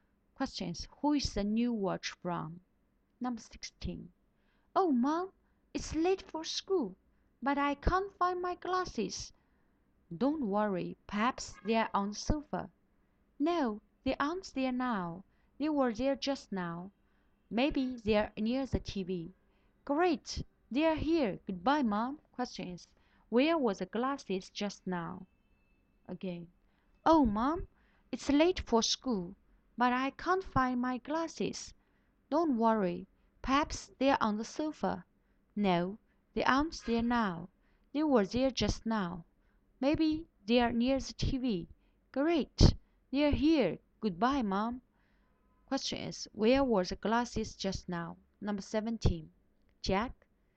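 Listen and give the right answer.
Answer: On the sofa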